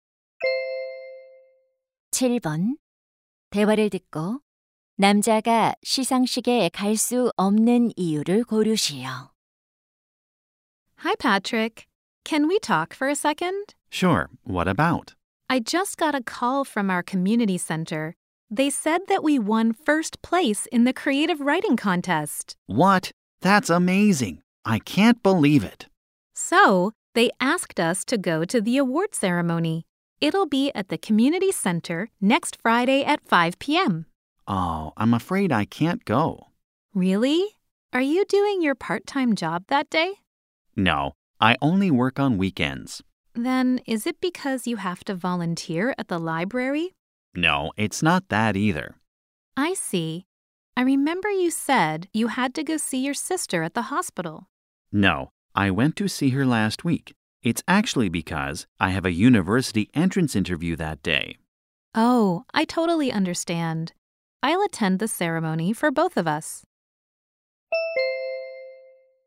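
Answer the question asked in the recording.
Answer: 대학 입학 면접이 있어서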